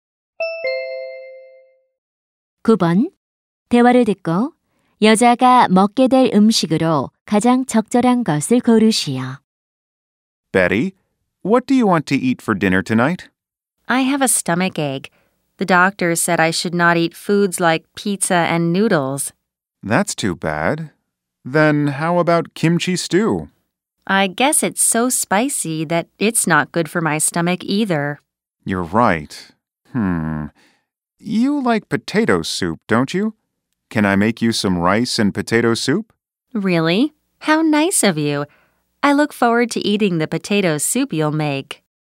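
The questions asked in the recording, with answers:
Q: 대화를 듣고 여자가 먹게 될 음식으로 가장 적절한 것을 고르시오.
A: 밥과 감자 수프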